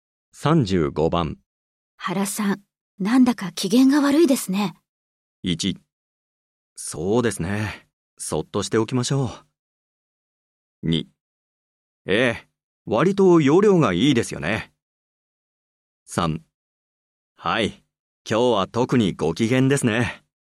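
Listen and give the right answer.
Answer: 1: そうですね。そっとしておきましょう。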